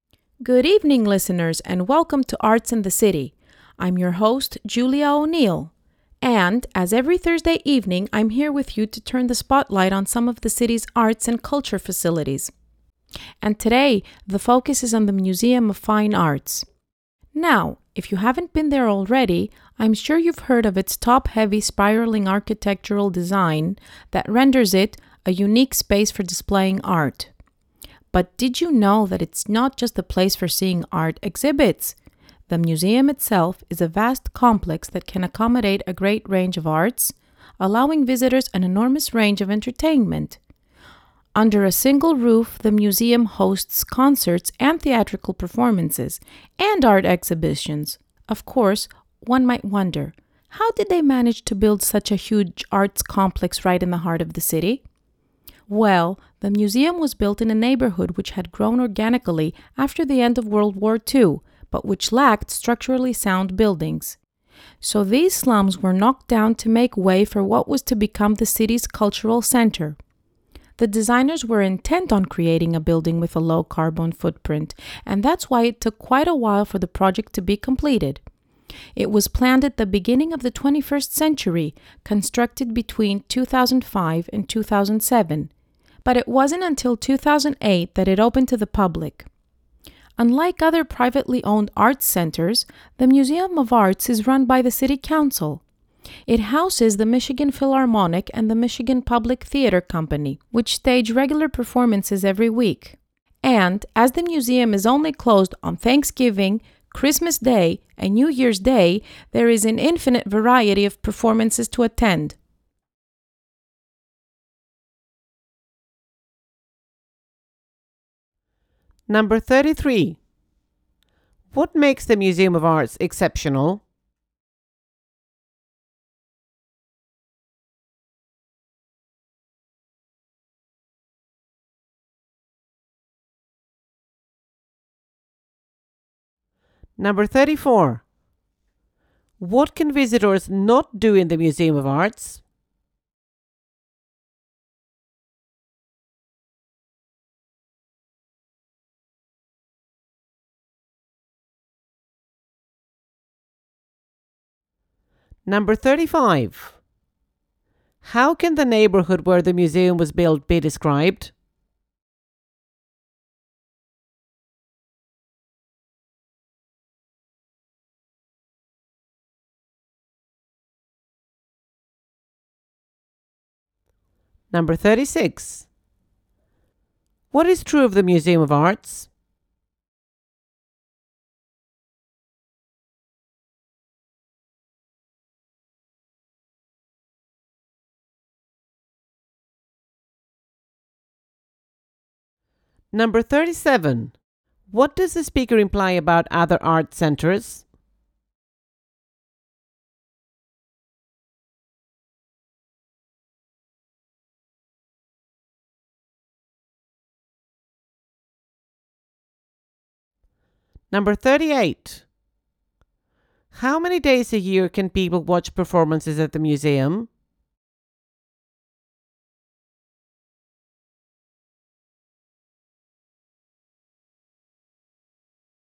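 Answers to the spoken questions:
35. It was a slum with buildings that were not structurally sound
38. 362 days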